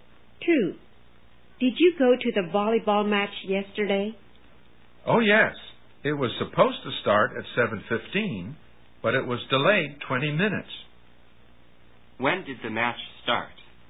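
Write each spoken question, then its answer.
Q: When did the match start?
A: At 7:35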